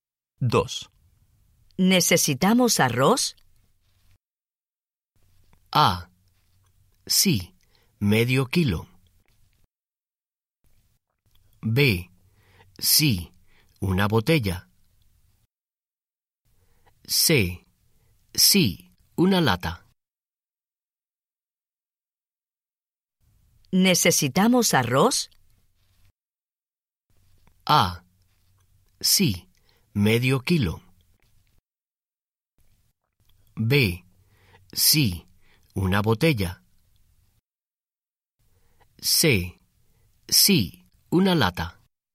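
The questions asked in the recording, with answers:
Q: ¿Necesitamos arroz?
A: A: Sí, medio kilo.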